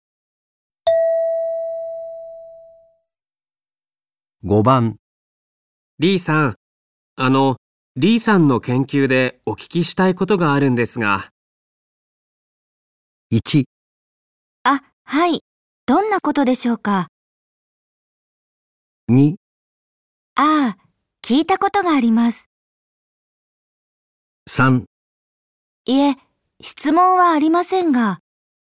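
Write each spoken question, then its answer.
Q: リーさん、リーさんの研究でお聞きしたいことがあるんですが。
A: 1: あ、はい。どんなことでしょうか?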